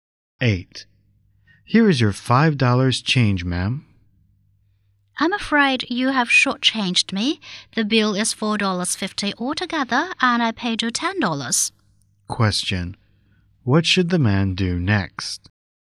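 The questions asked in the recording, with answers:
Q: What should the man do next?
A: Give the woman 50 cents more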